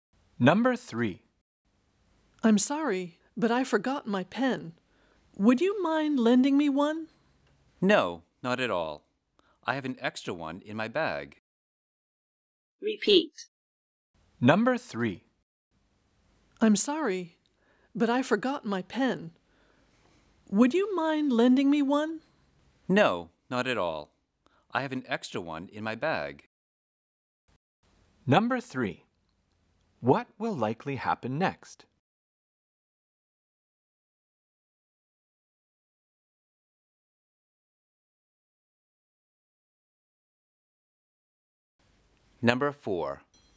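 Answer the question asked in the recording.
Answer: The other person will lend a pen from their bag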